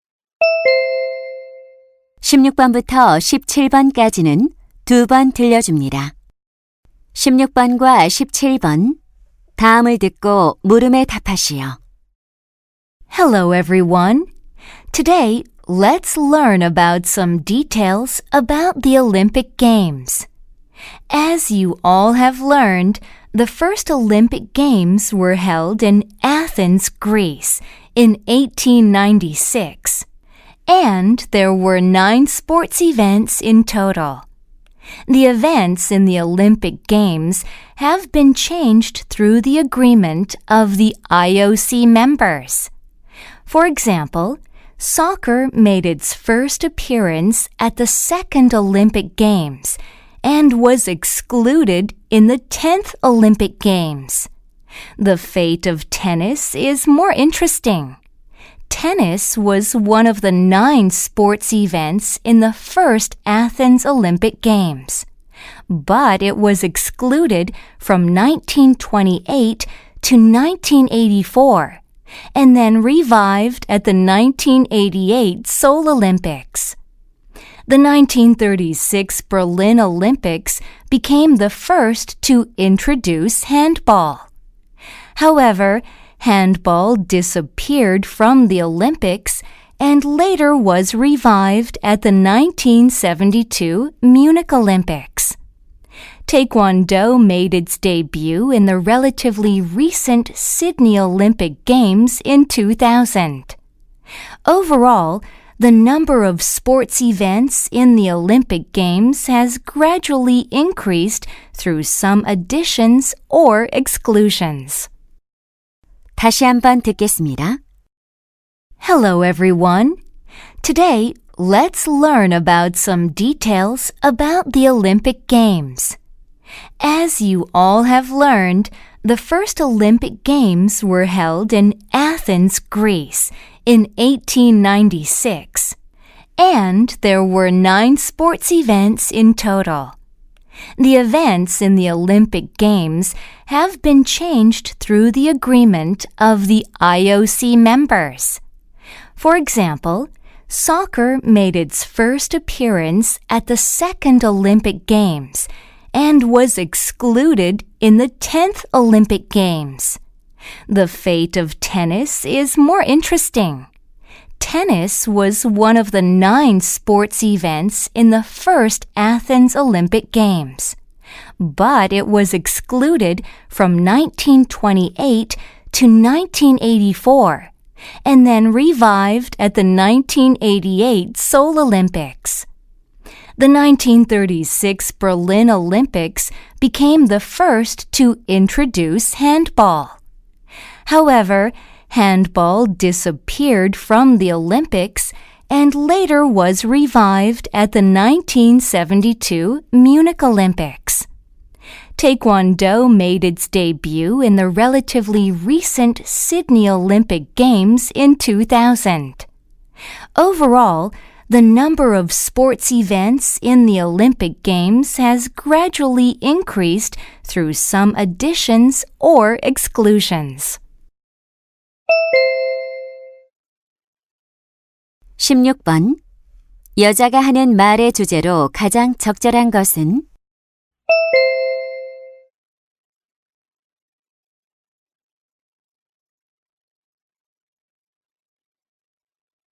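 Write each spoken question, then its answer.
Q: 여자가 하는 말의 주제로 가장 적절한 것은?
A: 올림픽 경기 종목의 변화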